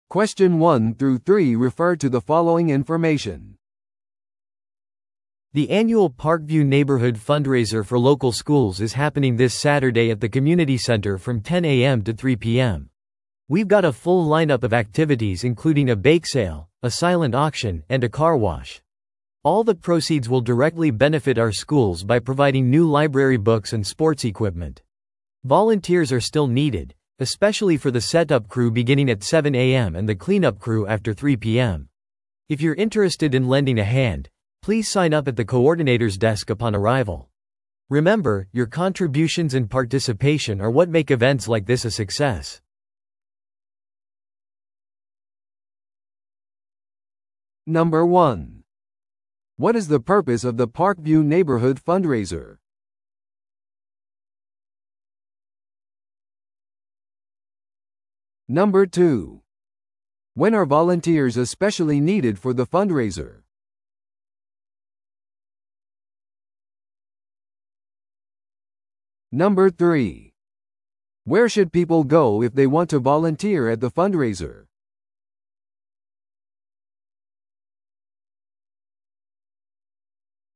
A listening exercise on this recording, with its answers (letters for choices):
Listen to the audio below and answer the questions.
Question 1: What is the purpose of the Parkview Neighborhood Fundraiser?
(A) 地元の祭りを祝うため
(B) 政治候補者を支持するため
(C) 学校に図書やスポーツ用具を提供するため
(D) 新しいコミュニティセンターを建設するため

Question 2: When are volunteers especially needed for the fundraiser?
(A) ベークセールの間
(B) 設営のための朝7時からと、後片付けのための午後3時以降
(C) サイレントオークションの間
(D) カーウォッシュが行われる間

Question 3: Where should people go if they want to volunteer at the fundraiser?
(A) コミュニティセンターのメインオフィスを訪れる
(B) パークビュー地区のホットラインに電話する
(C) 学校の校長にメールする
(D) コーディネーターのデスクでサインアップする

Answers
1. C
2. B
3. D

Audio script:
The annual Parkview Neighborhood Fundraiser for local schools is happening this Saturday at the community center from 10am to 3pm. We've got a full lineup of activities including a bake sale, a silent auction, and a car wash. All the proceeds will directly benefit our schools by providing new library books and sports equipment. Volunteers are still needed, especially for the setup crew beginning at 7am and the cleanup crew after 3pm. If you're interested in lending a hand, please sign up at the coordinator's desk upon arrival. Remember, your contributions and participation are what make events like this a success!